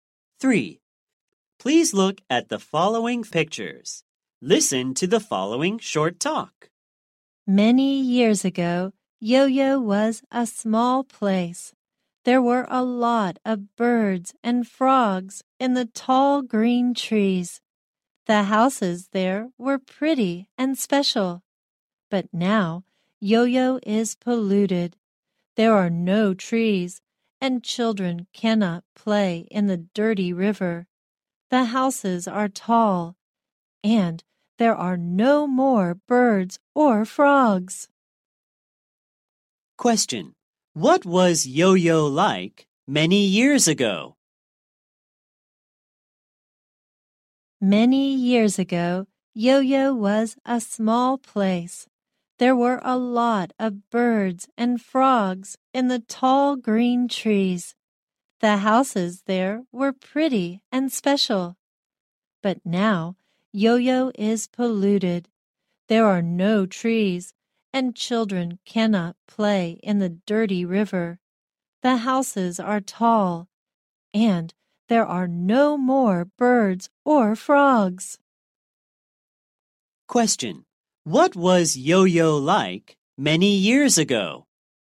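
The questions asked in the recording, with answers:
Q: Question. What was Yo-Yo like many years ago?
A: A small place with tall green trees, birds and frogs, and pretty houses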